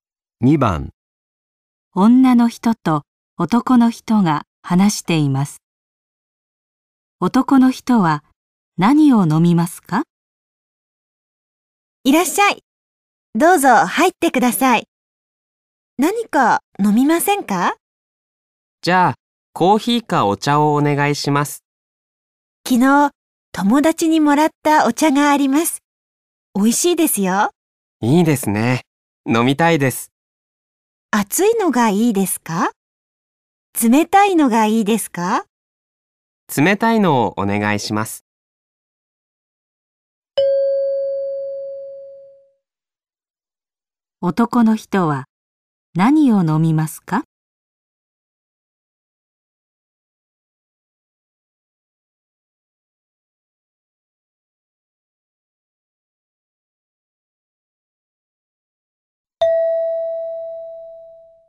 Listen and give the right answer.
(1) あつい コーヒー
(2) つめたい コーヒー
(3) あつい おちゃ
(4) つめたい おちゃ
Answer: (4) つめたい おちゃ

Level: N5 Listening · Test 3